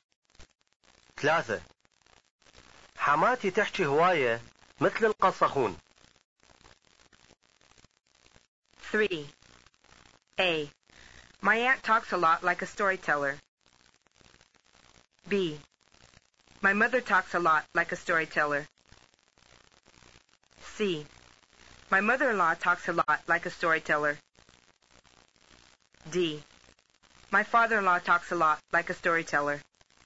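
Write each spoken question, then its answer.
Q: حماتي تحكي هواية مثل القصخون.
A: C: My mother-in-law talks a lot like a storyteller.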